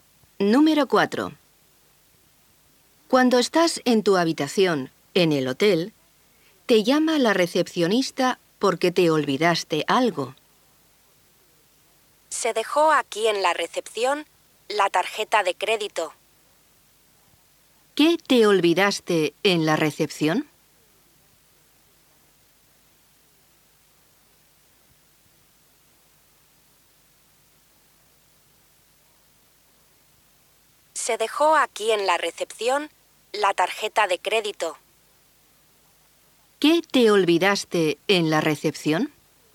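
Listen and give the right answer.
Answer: La tarjeta de crédito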